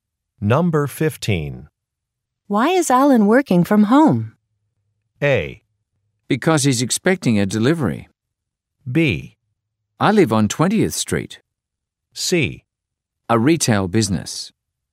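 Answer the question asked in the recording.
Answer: A: Because he's expecting a delivery.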